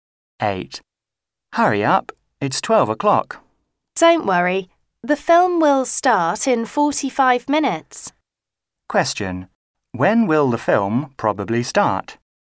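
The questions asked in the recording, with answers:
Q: When will the film probably start?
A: At 12:45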